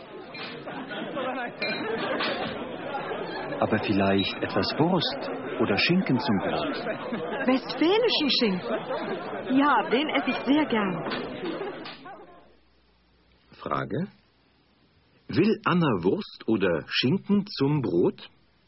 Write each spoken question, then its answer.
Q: Will Anna Wurst oder Schinken zum Brot?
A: Sie möchte Schinken zum Brot.